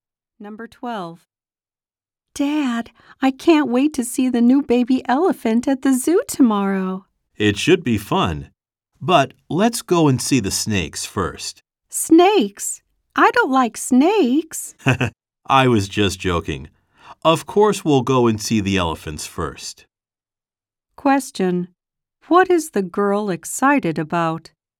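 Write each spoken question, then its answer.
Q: What is the girl excited about?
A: Seeing the new baby elephant at the zoo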